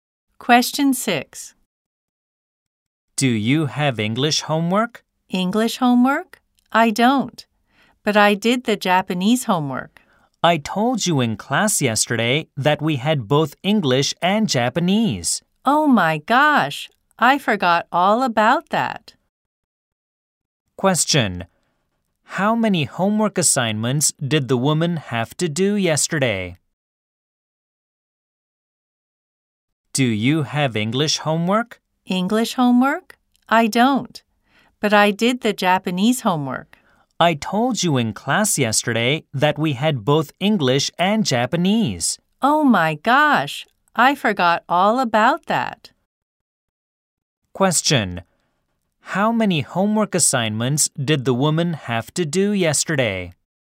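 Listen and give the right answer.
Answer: Two (English and Japanese)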